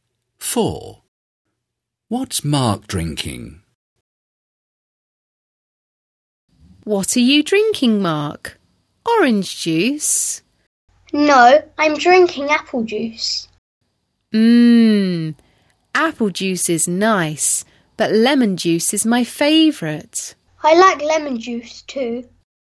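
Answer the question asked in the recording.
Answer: Apple juice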